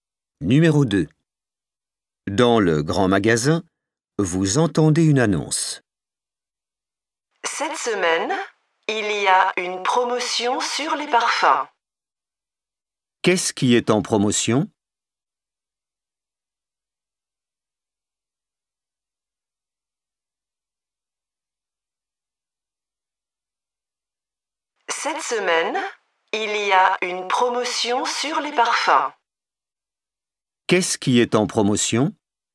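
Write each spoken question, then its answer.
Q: Qu'est-ce qui est en promotion?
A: les parfums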